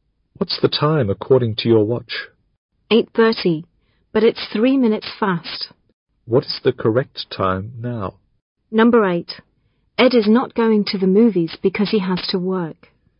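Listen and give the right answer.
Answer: 8:27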